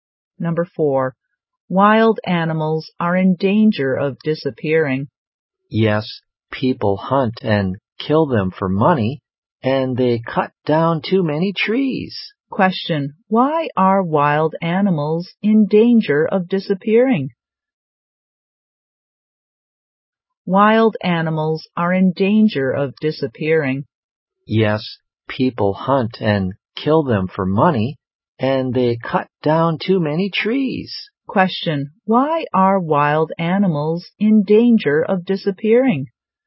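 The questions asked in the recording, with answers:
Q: why are wild animals in danger of disappearing?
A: People hunt and kill them for money and cut down too many trees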